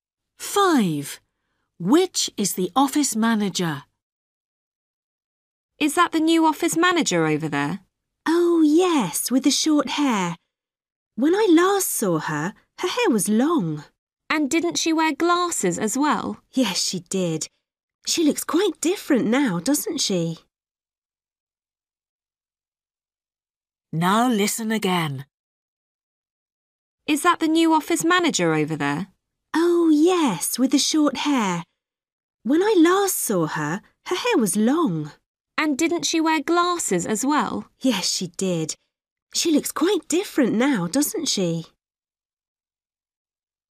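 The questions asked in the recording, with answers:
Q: Which is the office manager?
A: The woman with short hair and no glasses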